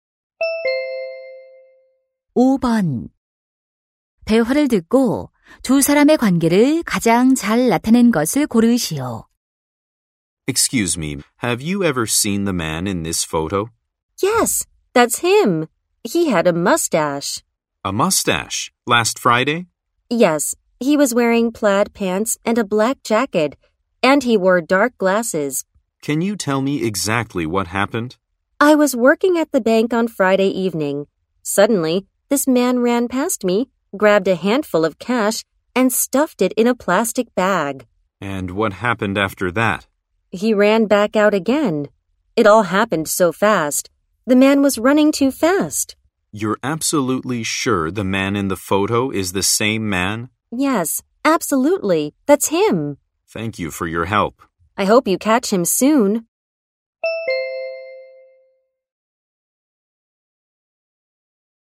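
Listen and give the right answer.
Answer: 경찰관 - 목격자(은행 직원)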